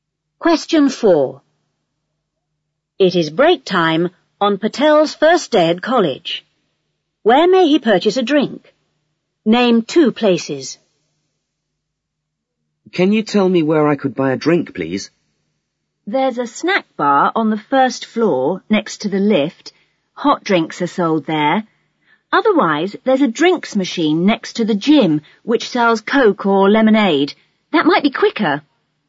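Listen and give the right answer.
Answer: Snack bar on the first floor next to the lift; drinks machine next to the gym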